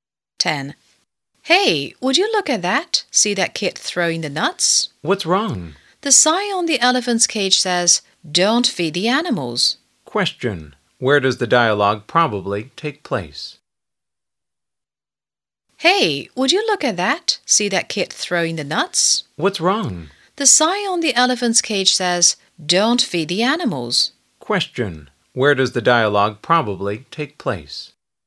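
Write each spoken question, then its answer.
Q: Question. Where does the dialogue probably take place?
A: At a zoo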